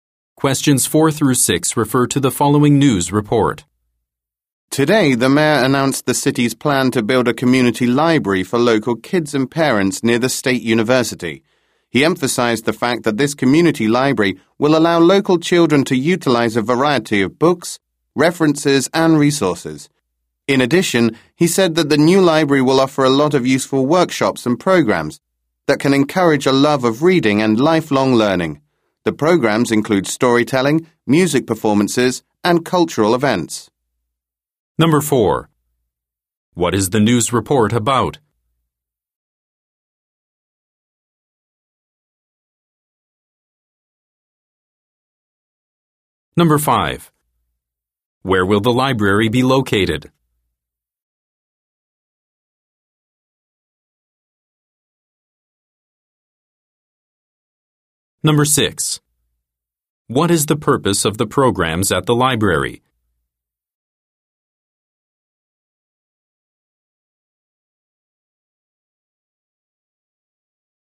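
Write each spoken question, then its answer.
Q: What is the news report about?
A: The city's plan to build a community library.

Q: Where will the library be located?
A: Near the State University.

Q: What is the purpose of the programs at the library?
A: To encourage a love of reading and lifelong learning.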